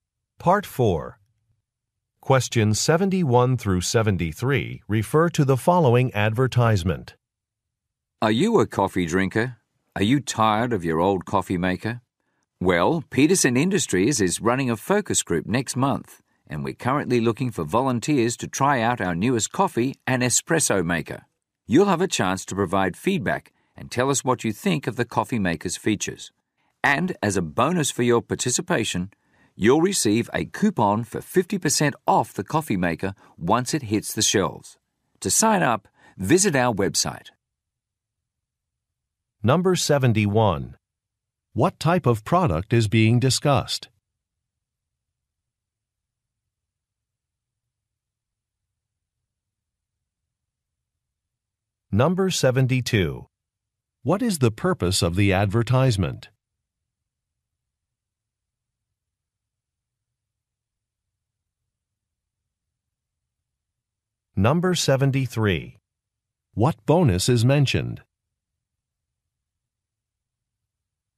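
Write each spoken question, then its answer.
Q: What type of product is being discussed?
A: A coffee maker

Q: What is the purpose of the advertisement?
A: To find volunteers for a focus group

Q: What bonus is mentioned?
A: A coupon for 50% off the coffee maker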